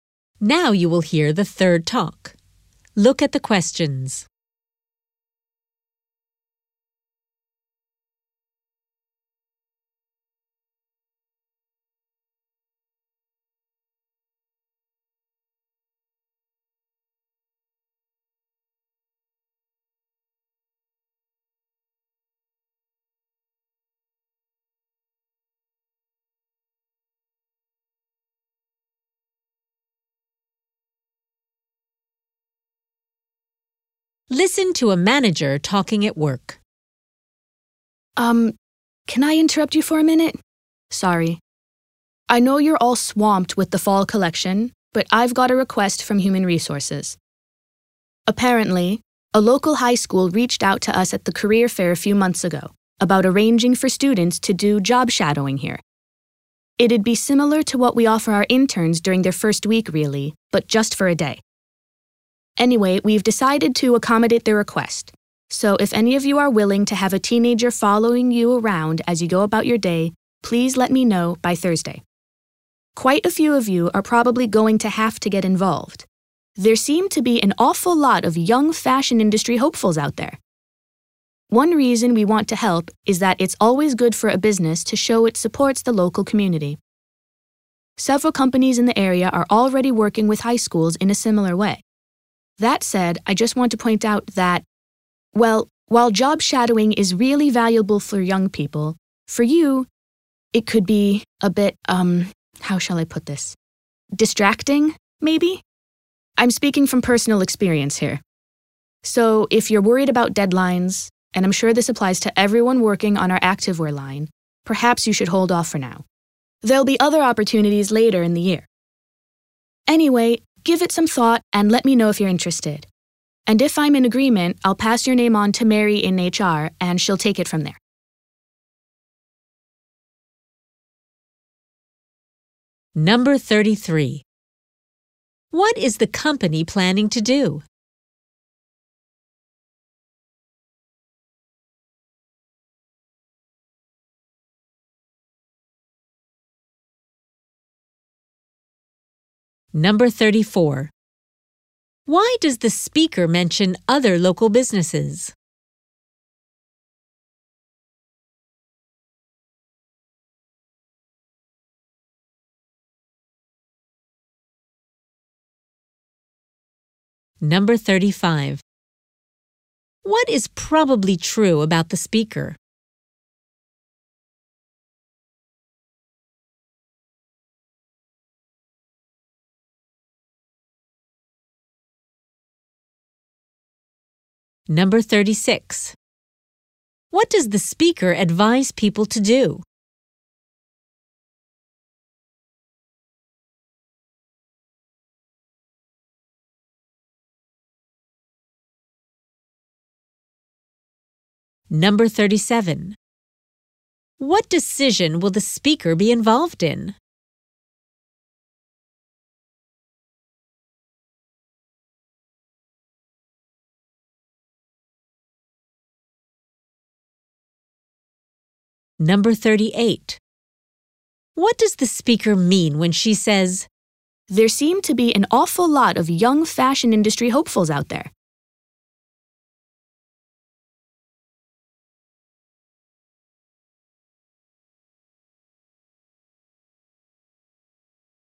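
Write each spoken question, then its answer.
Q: What is the company planning to do?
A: To let high school students job-shadow employees for a day.

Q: Why does the speaker mention other local businesses?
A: To show that other companies already support local high schools in a similar way.

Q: What is probably true about the speaker?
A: She has had a job shadow before and found it distracting.

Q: What does the speaker advise people to do?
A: Staff worried about deadlines should wait for a later opportunity.

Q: What decision will the speaker be involved in?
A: Approving which employees take part before their names go to HR.

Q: What does the speaker mean when she says, "There seem to be an awful lot of young fashion industry hopefuls out there"?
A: Many students want to take part, so many staff will be needed.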